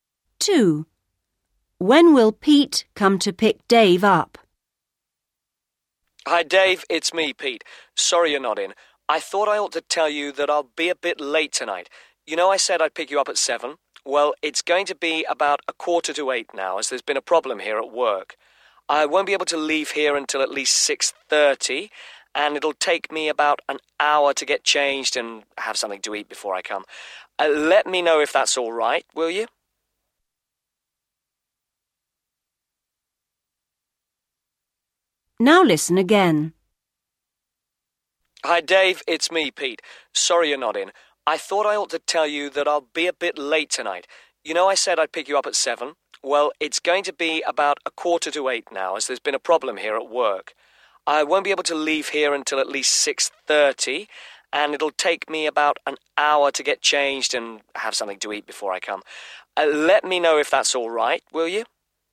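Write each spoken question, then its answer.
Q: When will Pete come to pick Dave up?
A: At about 7:45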